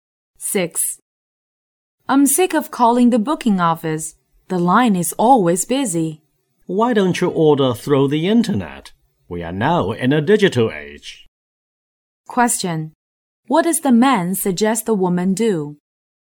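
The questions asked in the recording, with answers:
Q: What does the man suggest the woman do?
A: Book online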